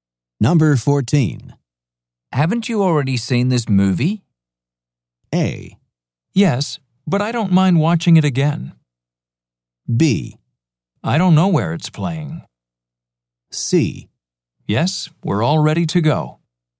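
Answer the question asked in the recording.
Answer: A: Yes, but I don't mind watching it again.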